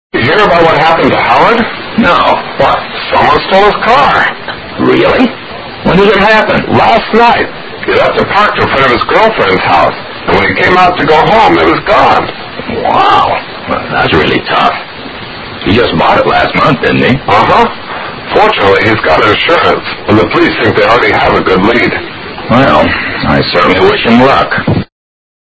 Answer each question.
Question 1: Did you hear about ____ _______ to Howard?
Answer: what happened

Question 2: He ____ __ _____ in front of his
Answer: left it parked

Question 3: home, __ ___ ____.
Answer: it was gone

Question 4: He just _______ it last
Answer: bought

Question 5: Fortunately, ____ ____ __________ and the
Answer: he's got insurance

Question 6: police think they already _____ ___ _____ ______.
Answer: have a good lead

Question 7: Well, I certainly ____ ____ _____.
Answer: wish him luck

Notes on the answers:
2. left it parked:parked是宾语补足语。park 停放(车辆)。如:He parked his car over there. 停车场叫parking lot/parking place/parking area等。
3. it was gone=it disappeared/it was missing
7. wish him luck:wish表示祝愿,其后接双宾语。